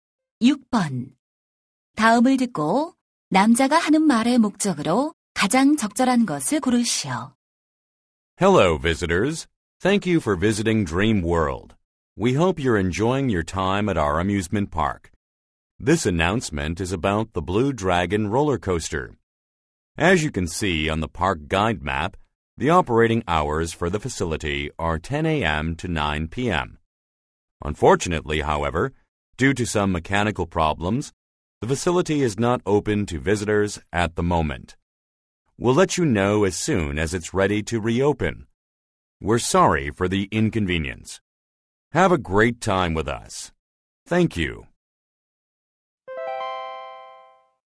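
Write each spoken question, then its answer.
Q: 다음을 듣고 남자가 하는 말의 목적으로 가장 적절한 것을 고르시오.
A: 롤러코스터 운행 중단을 알리려고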